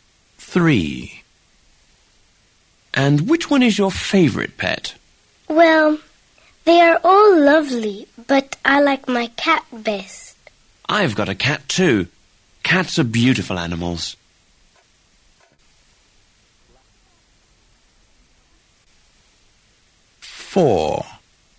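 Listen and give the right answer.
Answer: her cat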